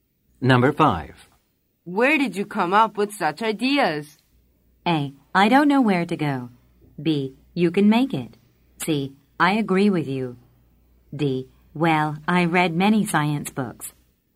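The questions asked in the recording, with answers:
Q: Where did you come up with such ideas?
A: D: Well, I read many science books.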